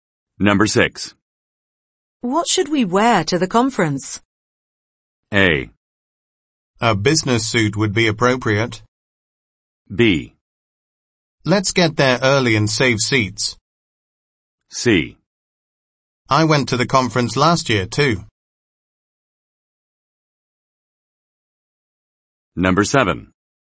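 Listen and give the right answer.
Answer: A: A business suit would be appropriate.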